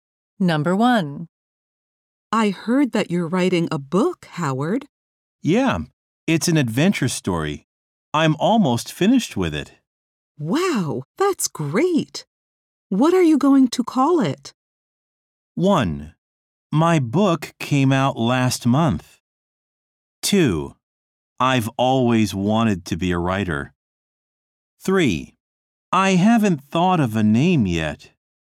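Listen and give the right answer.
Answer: 3: I haven't thought of a name yet.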